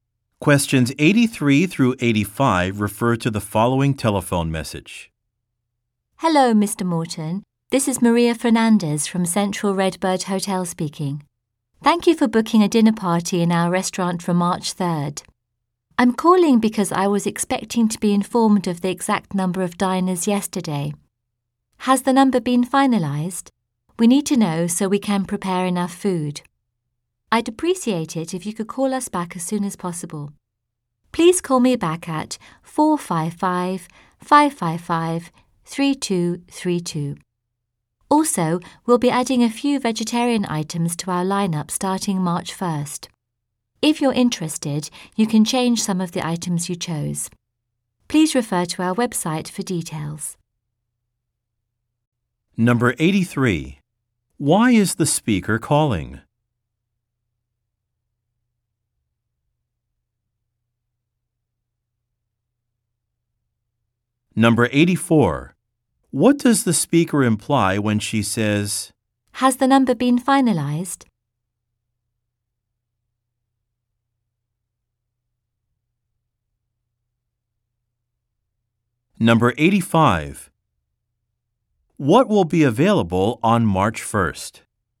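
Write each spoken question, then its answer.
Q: Why is the speaker calling?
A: To ask for the final number of diners for the dinner party

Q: What does the speaker imply when she says,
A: She has not yet been told the number of diners she expected yesterday

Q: What will be available on March 1st?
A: Some vegetarian menu items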